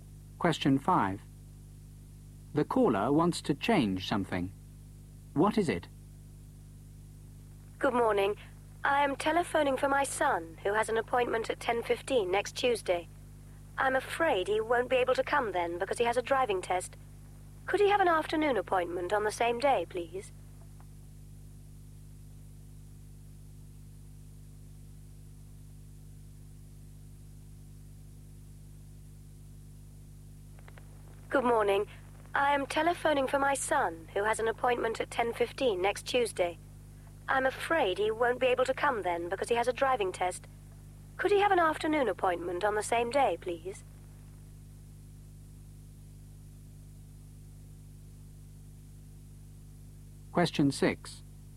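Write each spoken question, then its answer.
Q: What is it?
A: The time of her son's appointment (10:15 next Tuesday) to an afternoon on the same day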